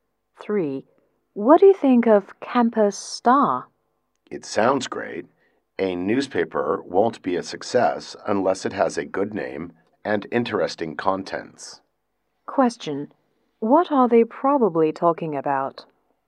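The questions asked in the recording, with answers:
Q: What are they probably talking about?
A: The name of a newspaper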